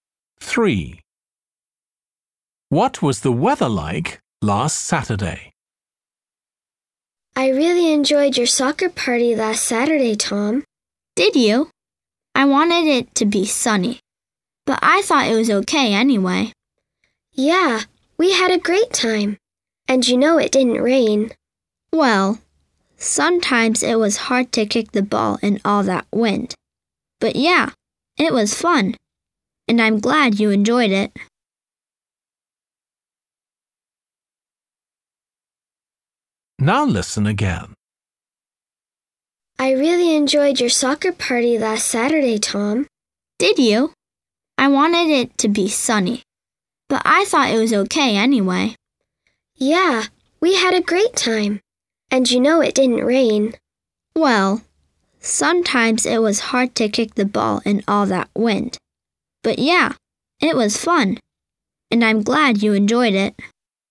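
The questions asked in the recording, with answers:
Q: What was the weather like last Saturday?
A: windy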